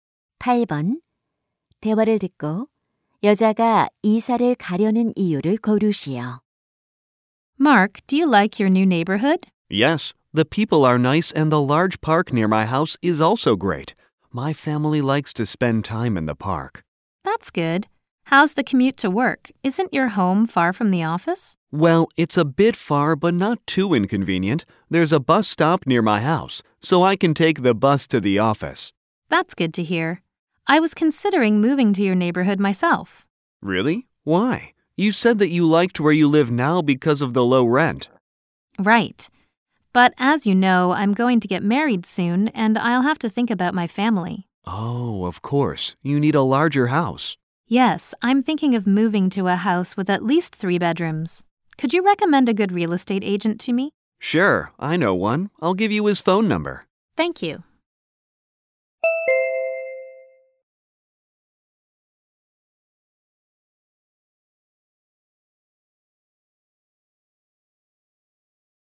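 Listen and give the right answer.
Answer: 곧 결혼해서 더 큰 집이 필요해서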